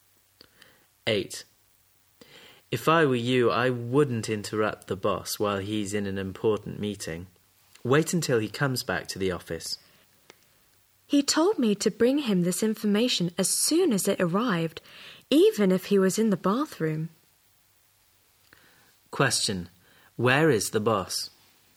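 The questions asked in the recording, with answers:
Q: Where is the boss?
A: In an important meeting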